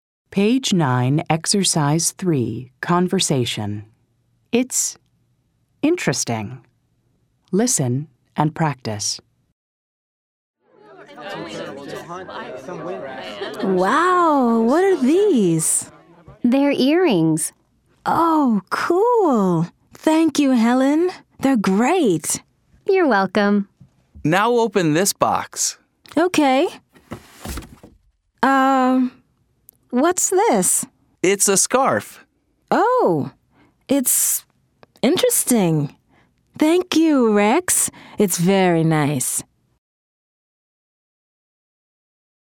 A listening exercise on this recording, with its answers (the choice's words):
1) Wendy asks, "What are these?" Helen says:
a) They're books.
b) They're earrings.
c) They're boxes.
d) They're scarves.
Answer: They're earrings.

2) Wendy says the earrings are ______.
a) old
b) bad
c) great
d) expensive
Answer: great

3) Rex says, "Now open this ______!"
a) bag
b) box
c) wallet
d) purse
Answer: box

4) The gift from Rex is a ______.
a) scarf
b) watch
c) ring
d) jacket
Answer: scarf

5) Helen says "You're welcome" after Wendy says ______.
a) Goodbye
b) I'm sorry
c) Thank you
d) Excuse me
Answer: Thank you

ضع True أو False:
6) Wendy asks about some earrings.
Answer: True

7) Helen gives Wendy a scarf.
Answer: False

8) Wendy thanks Helen for the earrings.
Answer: True

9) Rex tells Wendy to open a box.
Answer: True

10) The box has a scarf inside.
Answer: True

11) Wendy says, "It's very nice."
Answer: True